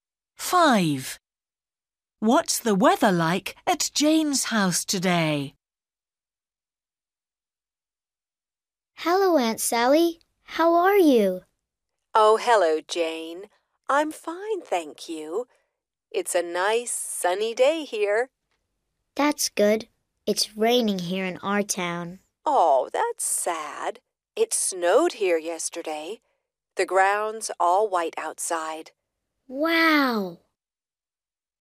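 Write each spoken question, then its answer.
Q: What's the weather like at Jane's house today?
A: It's raining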